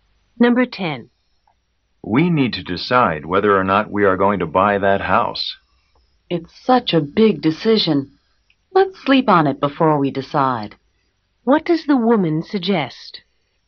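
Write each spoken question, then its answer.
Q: What does the woman suggest?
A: Waiting until tomorrow to decide about the house.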